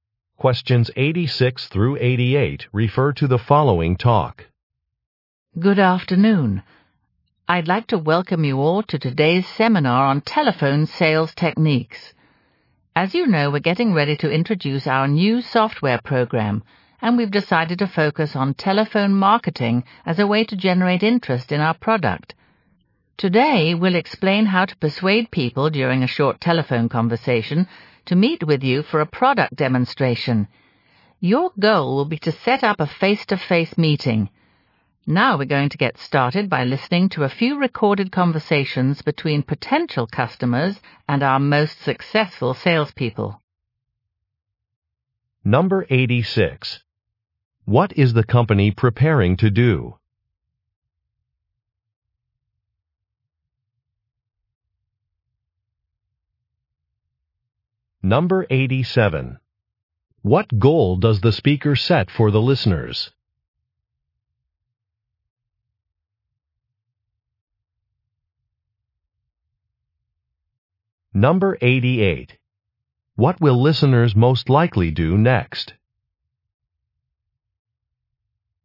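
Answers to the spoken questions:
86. Introduce a new software program
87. To set up face-to-face meetings
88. Listen to recorded sales conversations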